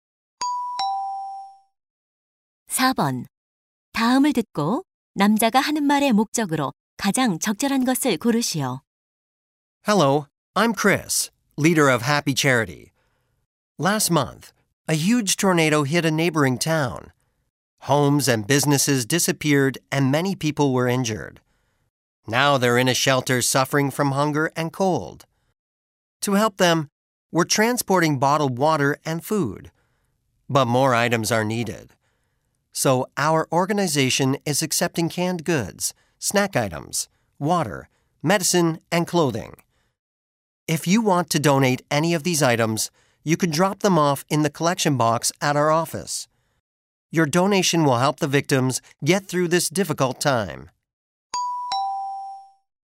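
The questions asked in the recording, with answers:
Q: 다음을 듣고 남자가 하는 말의 목적으로 가장 적절한 것을 고르시오.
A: 토네이도 피해자를 위한 물품 기부를 요청하려고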